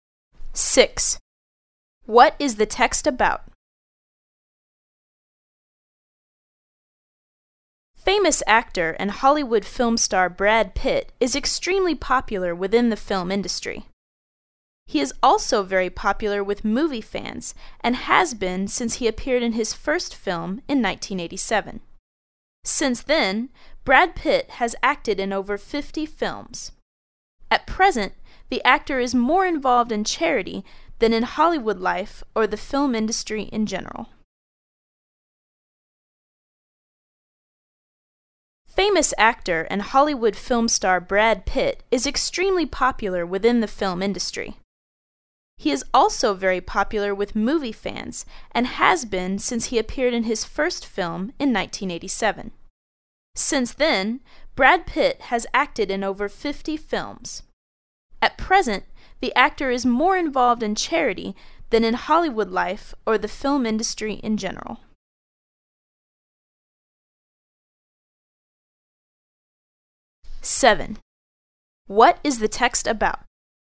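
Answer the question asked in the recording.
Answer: The actor Brad Pitt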